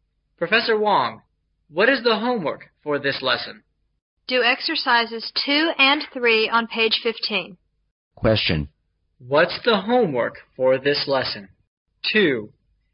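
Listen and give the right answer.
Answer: Exercises 2 and 3 on page 15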